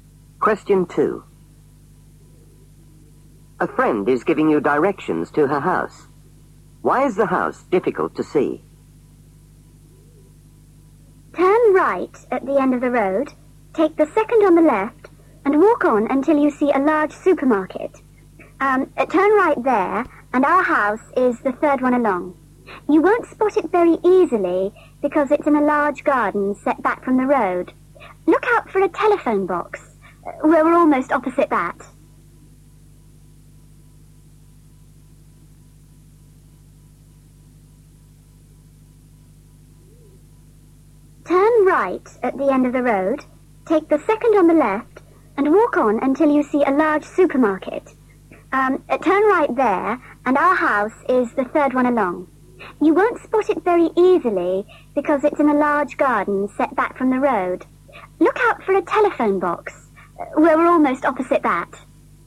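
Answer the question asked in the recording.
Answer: It's in a large garden set back from the road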